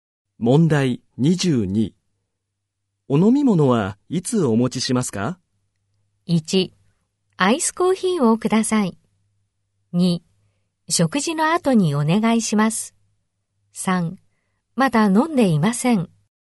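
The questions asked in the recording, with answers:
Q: お飲み物はいつお持ちしますか?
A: 2: 食事の後にお願いします。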